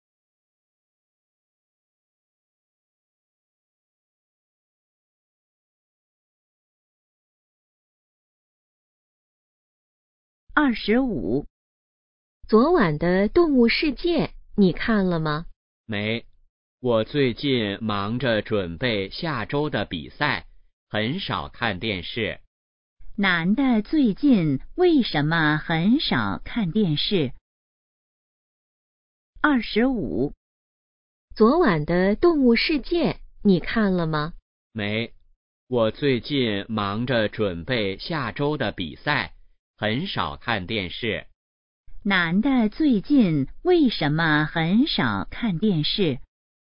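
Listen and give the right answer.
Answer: 忙着准备比赛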